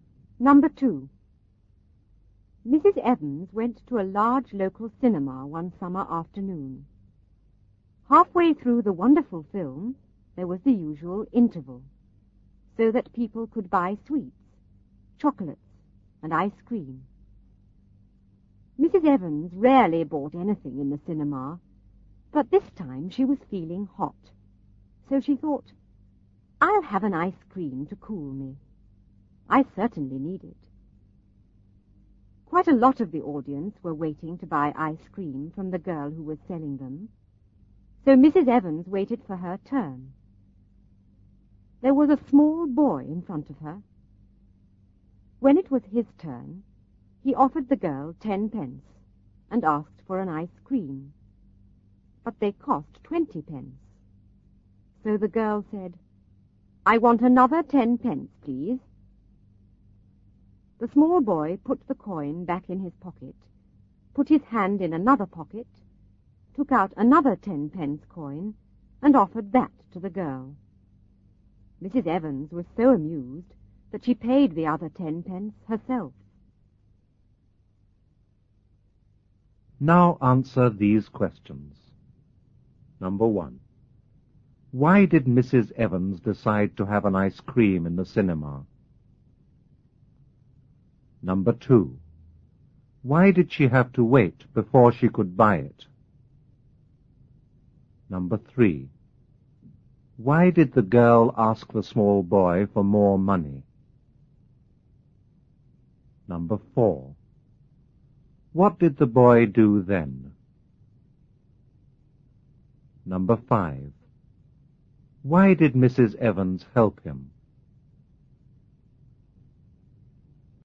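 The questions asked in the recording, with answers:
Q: Why did Mrs. Evans decide to have an ice cream in the cinema?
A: Because she was feeling hot and wanted to cool down.

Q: Why did she have to wait before she could buy it?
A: Quite a lot of people were waiting to buy ice cream.

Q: Why did the girl ask the small boy for more money?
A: Ice creams cost 20 pence and he offered only 10 pence.

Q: What did the boy do then?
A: He put the coin back in his pocket and offered another 10 pence coin from another pocket.

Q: Why did Mrs. Evans help him?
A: Because she was amused.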